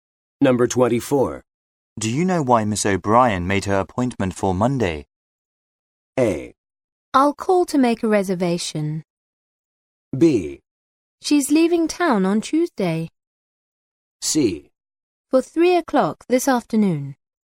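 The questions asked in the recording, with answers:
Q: Do you know why Miss O'Brien made her appointment for Monday?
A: B: She's leaving town on Tuesday.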